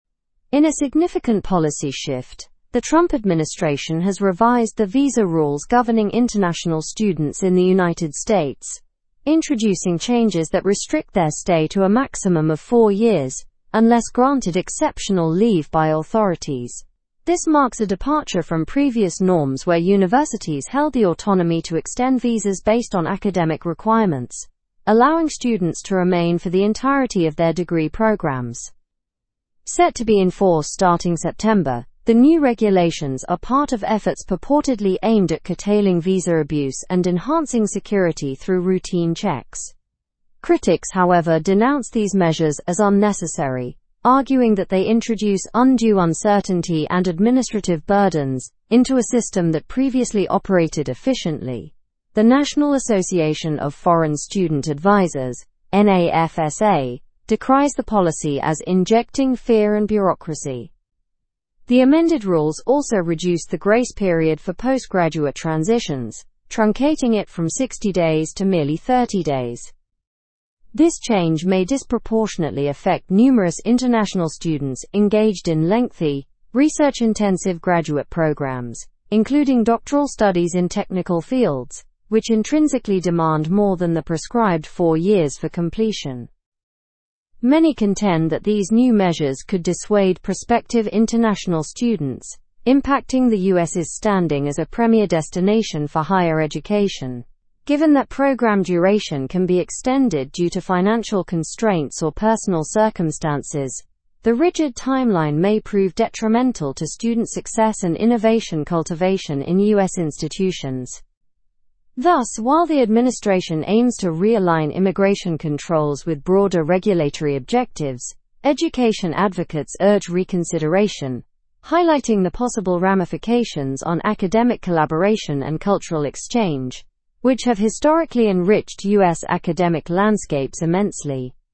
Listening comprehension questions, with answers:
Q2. Previously, who could extend international students' visas and why?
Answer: Universities, based on academic requirements.

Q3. When are the new visa rules set to be enforced?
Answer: Starting September.

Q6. Which type of graduate programs might be most affected by the change in grace period?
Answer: Research-intensive graduate programs and doctoral studies.

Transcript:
In a significant policy shift, the Trump administration has revised the visa rules governing international students in the United States, introducing changes that restrict their stay to a maximum of four years unless granted exceptional leave by authorities. This marks a departure from previous norms where universities held the autonomy to extend visas based on academic requirements, allowing students to remain for the entirety of their degree programs.
Set to be enforced starting September, the new regulations are part of efforts purportedly aimed at curtailing visa abuse and enhancing security through routine checks. Critics, however, denounce these measures as unnecessary, arguing that they introduce undue uncertainty and administrative burdens into a system that previously operated efficiently. The National Association of Foreign Student Advisers (NAFSA) decries the policy as "injecting fear and bureaucracy."
The amended rules also reduce the grace period for post-graduate transitions, truncating it from 60 days to merely 30 days. This change may disproportionately affect numerous international students engaged in lengthy, research-intensive graduate programs, including doctoral studies in technical fields, which intrinsically demand more than the prescribed four years for completion.
Many contend that these new measures could dissuade prospective international students, impacting the US's standing as a premier destination for higher education. Given that program duration can be extended due to financial constraints or personal circumstances, the rigid timeline may prove detrimental to student success and innovation cultivation in US institutions.
Thus, while the administration aims to realign immigration controls with broader regulatory objectives, education advocates urge reconsideration, highlighting the possible ramifications on academic collaboration and cultural exchange, which have historically enriched US academic landscapes immensely.

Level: Level 4